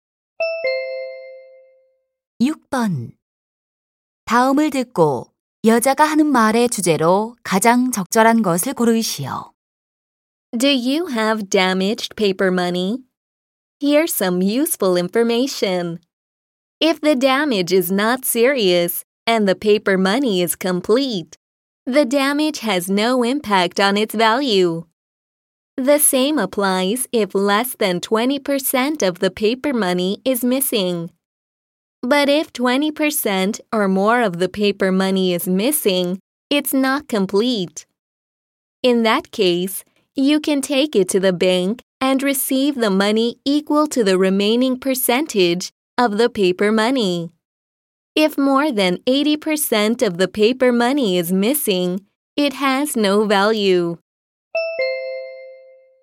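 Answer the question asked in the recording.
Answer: 훼손된 지폐의 가치 인정 기준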